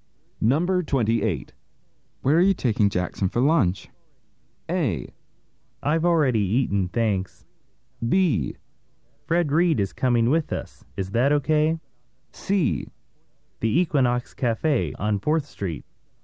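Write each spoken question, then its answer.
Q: Where are you taking Jackson for lunch?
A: C: The Equinox Cafe on 4th Street.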